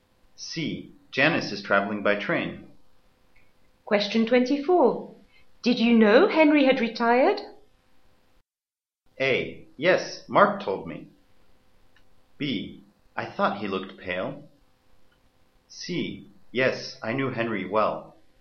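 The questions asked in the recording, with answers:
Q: Did you know Henry had retired?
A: A: Yes, Mark told me.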